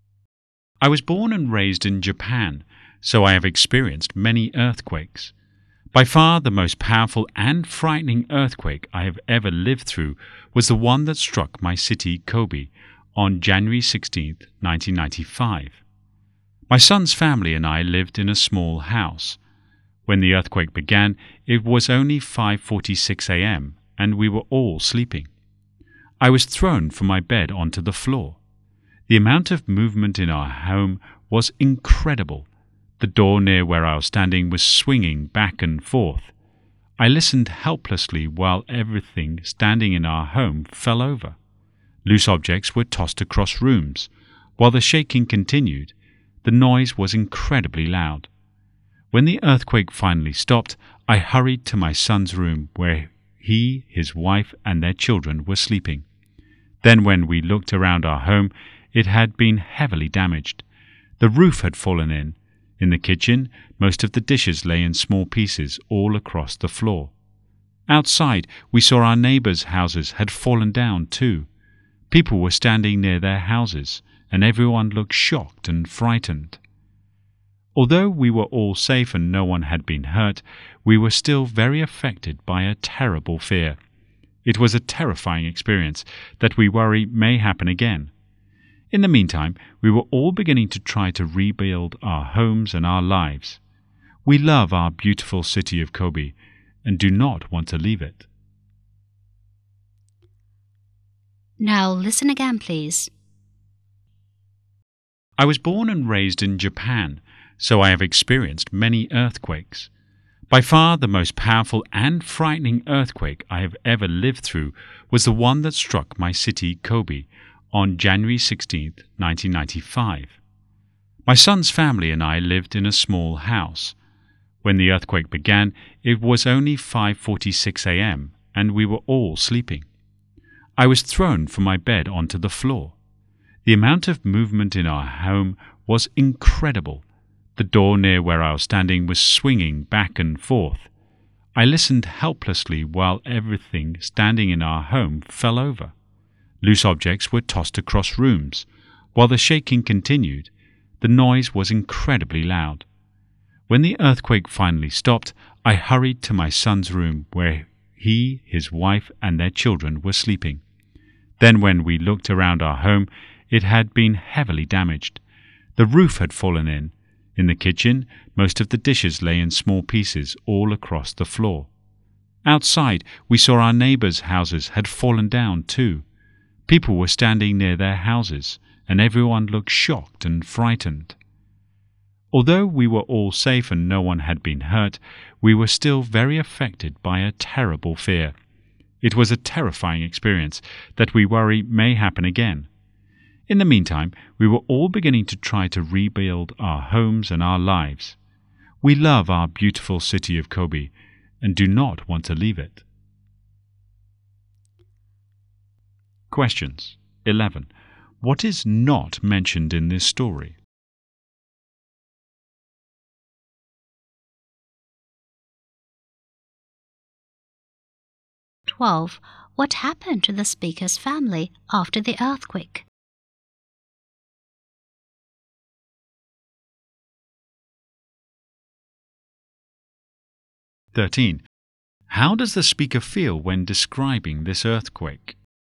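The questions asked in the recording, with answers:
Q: What happened to the speaker's family after the earthquake?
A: They were all safe and no one was hurt, but their house was heavily damaged

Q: How does the speaker feel when describing this earthquake?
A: Frightened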